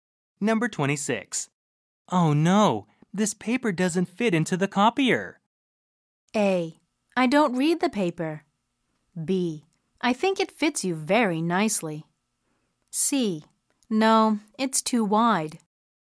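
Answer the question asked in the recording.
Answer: C: No, it's too wide.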